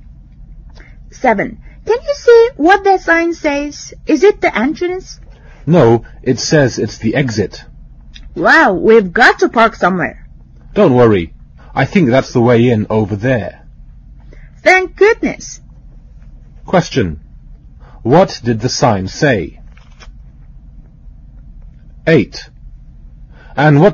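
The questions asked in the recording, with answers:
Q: What did the sign say?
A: Exit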